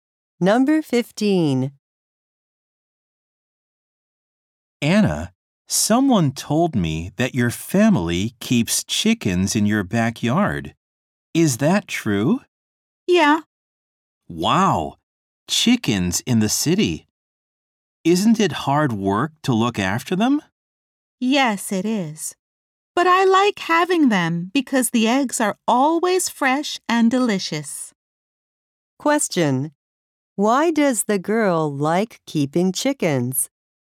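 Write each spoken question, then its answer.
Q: Why does the girl like keeping chickens?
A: The eggs are always fresh and delicious.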